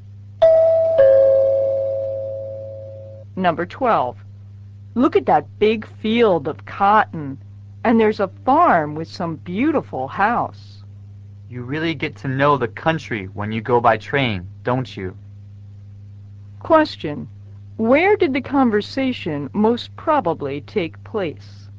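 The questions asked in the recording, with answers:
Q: Where did the conversation most probably take place?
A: On a train.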